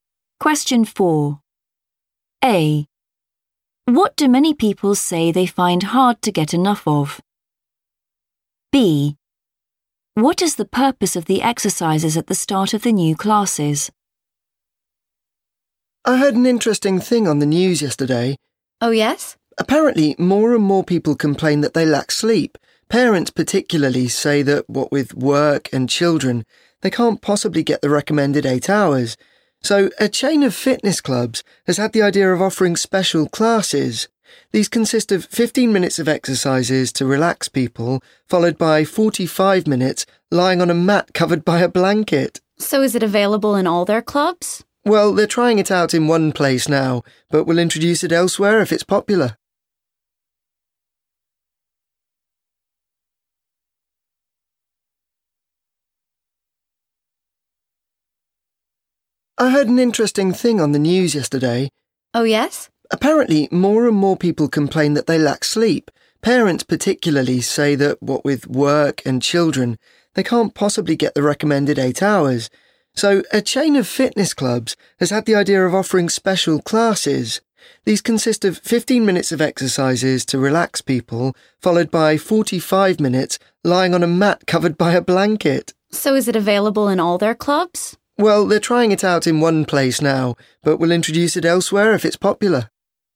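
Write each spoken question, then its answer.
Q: What do many people say they find hard to get enough of?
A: sleep

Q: What is the purpose of the exercises at the start of the new classes?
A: to relax people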